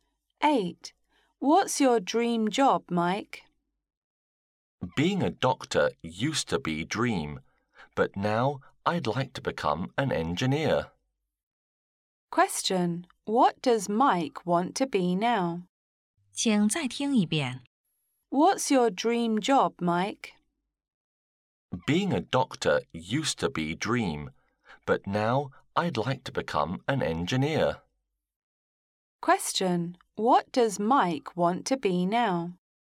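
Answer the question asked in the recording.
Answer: An engineer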